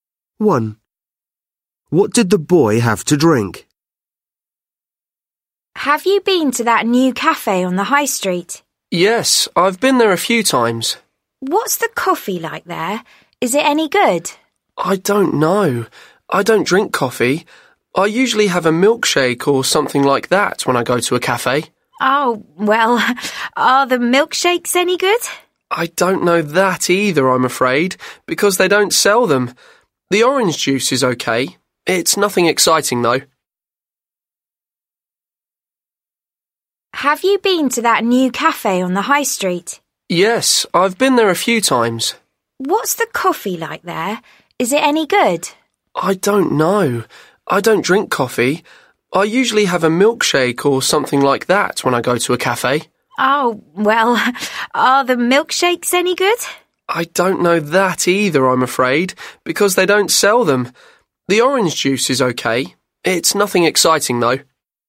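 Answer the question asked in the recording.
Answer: orange juice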